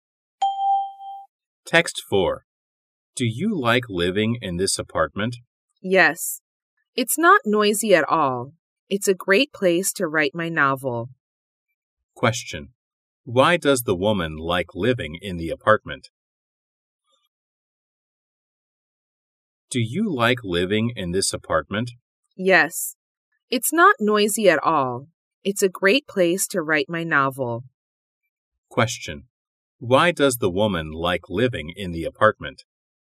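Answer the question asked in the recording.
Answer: It's not noisy at all.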